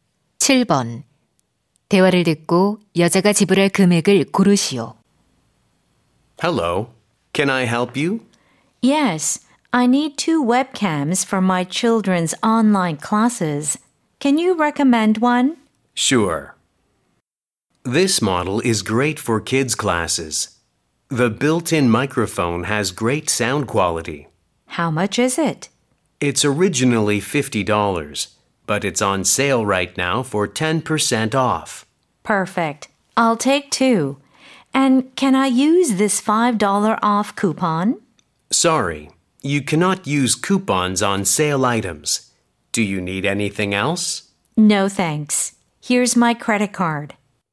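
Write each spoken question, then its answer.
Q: 대화를 듣고 여자가 지불할 금액을 고르시오.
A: 90달러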